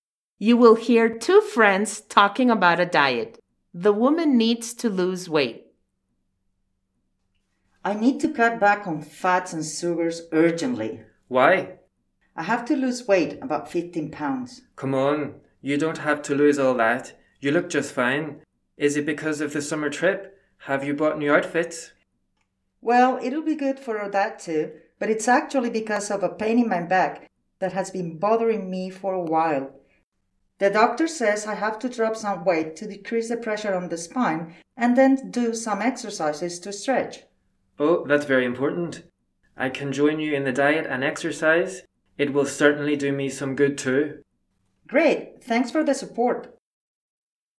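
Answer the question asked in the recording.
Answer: True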